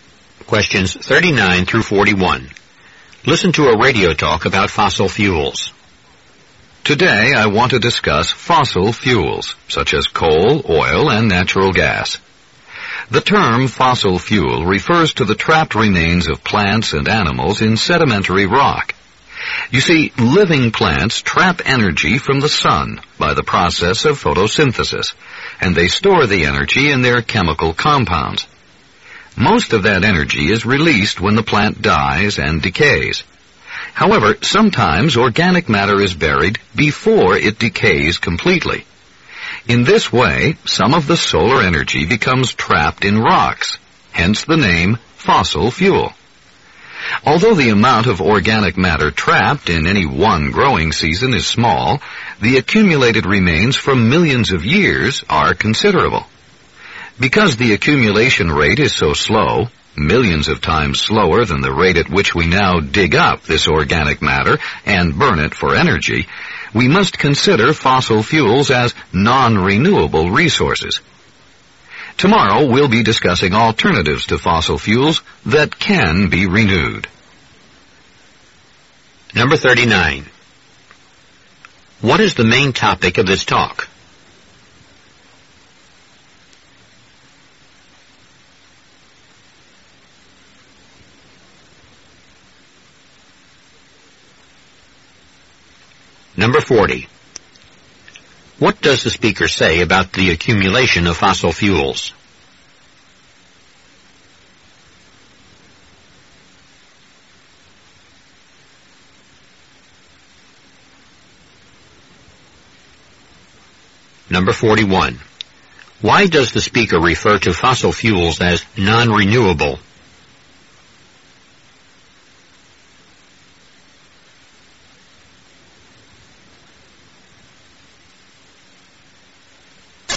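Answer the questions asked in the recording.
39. Fossil fuels
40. It is very slow, but over millions of years the remains add up to a lot
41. They build up millions of times more slowly than we use them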